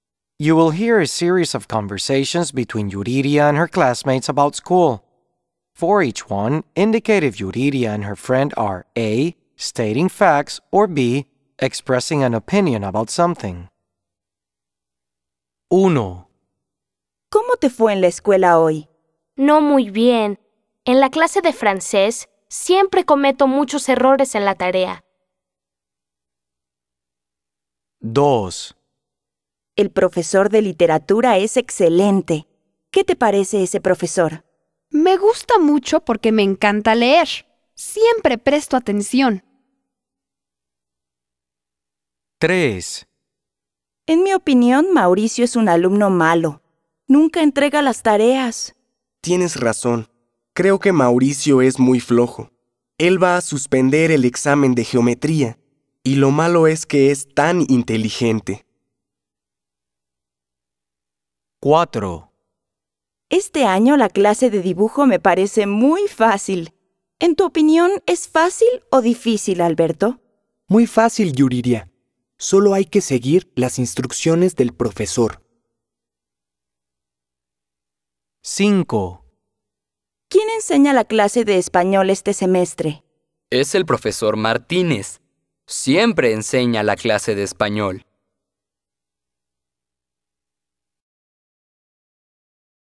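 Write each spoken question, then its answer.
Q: For each one, indicate if Yuridia and her friend are A, stating facts, or B, expressing an opinion about something.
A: B: expressing an opinion about something

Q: For each one, indicate if Yuridia and her friend are A, stating facts, or B, expressing an opinion about something.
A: B: expressing an opinion about something

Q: For each one, indicate if Yuridia and her friend are A, stating facts, or B, expressing an opinion about something.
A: B: expressing an opinion about something

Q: For each one, indicate if Yuridia and her friend are A, stating facts, or B, expressing an opinion about something.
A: A: stating facts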